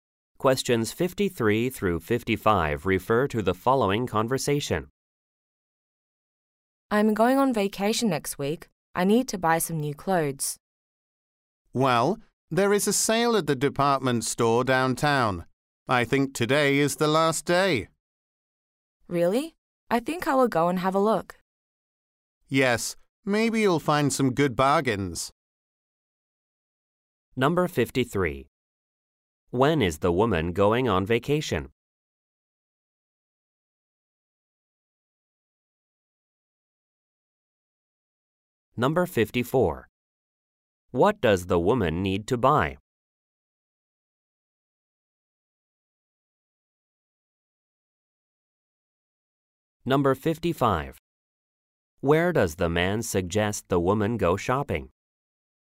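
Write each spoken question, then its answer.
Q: When is the woman going on vacation?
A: Next week

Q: What does the woman need to buy?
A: New clothes

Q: Where does the man suggest the woman go shopping?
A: The department store downtown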